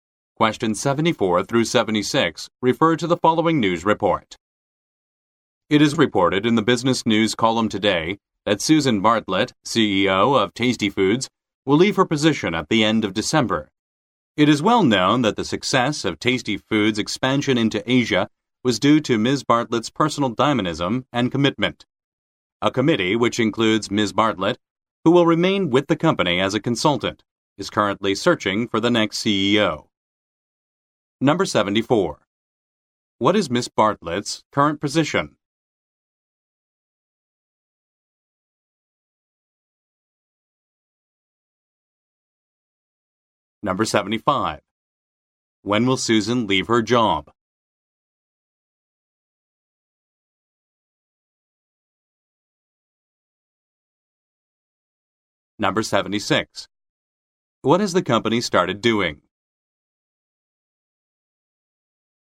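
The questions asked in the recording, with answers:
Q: What is Ms. Bartlett's current position?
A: CEO of Tasty Foods

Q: When will Susan leave her job?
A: At the end of December

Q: What has the company started doing?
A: Searching for the next CEO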